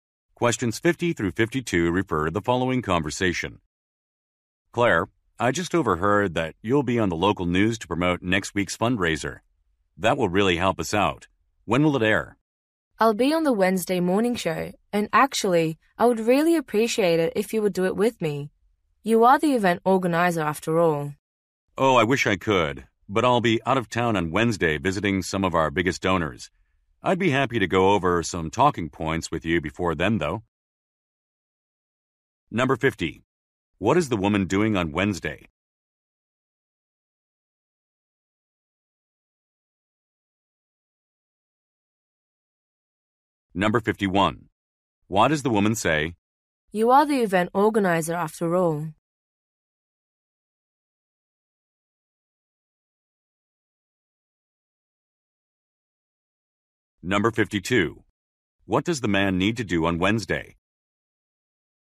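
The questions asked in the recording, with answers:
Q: What is the woman doing on Wednesday?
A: Appearing on the local news morning show

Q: What does the man need to do on Wednesday?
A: Visit major donors out of town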